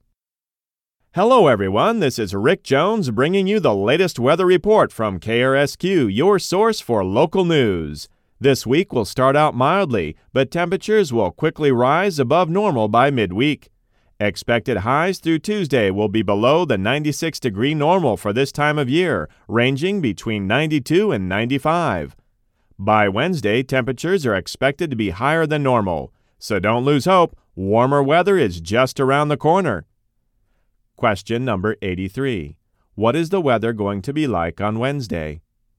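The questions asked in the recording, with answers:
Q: What is the weather going to be like on Wednesday?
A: Hotter than normal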